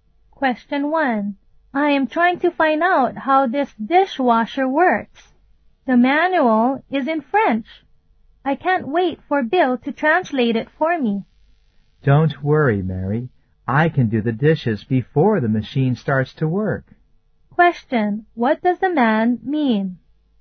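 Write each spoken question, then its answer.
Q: What does the man mean?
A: He can wash the dishes by hand until the machine is working.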